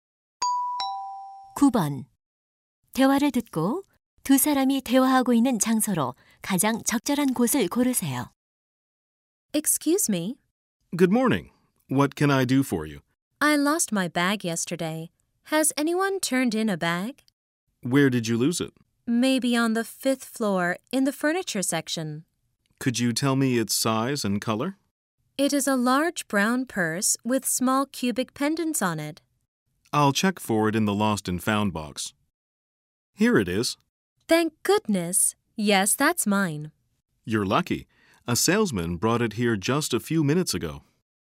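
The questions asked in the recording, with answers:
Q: 대화를 듣고 두 사람이 대화하고 있는 장소로 가장 적절한 곳을 고르세요.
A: 백화점 분실물 보관소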